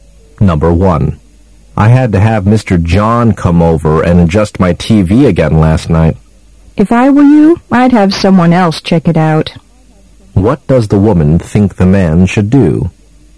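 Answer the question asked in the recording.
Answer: Have someone other than Mr. John check the TV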